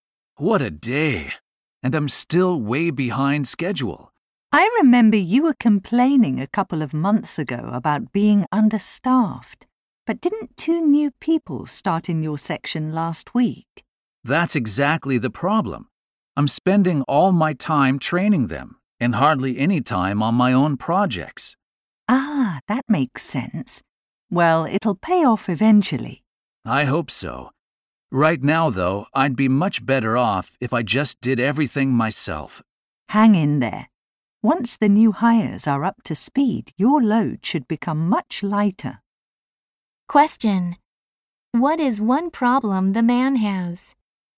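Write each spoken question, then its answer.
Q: What is one problem the man has?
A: He spends most of his time training new staff, so he is behind on his own projects.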